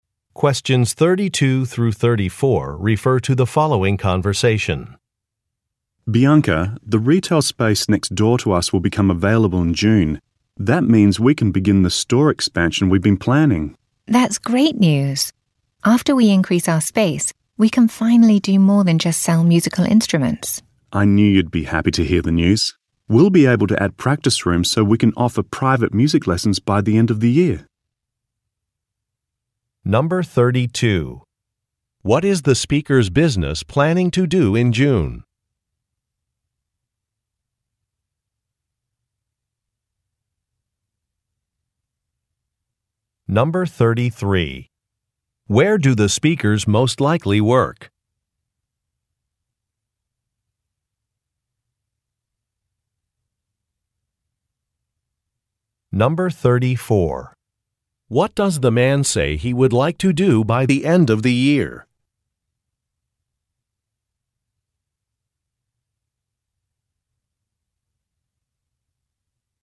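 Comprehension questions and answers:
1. What is the speakers' business planning to do in June?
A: Expand a space

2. Where do the speakers most likely work?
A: At a music shop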